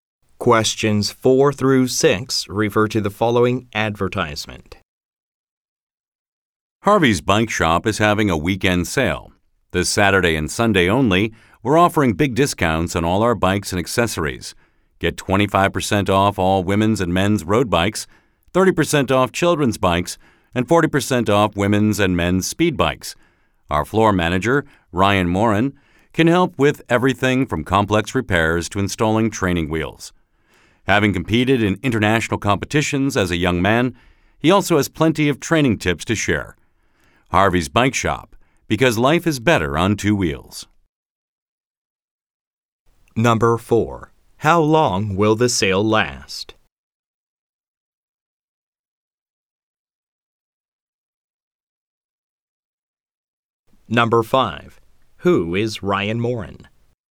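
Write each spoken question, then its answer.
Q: How long will the sale last?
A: Two days (this weekend)

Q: Who is Ryan Morin?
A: The floor manager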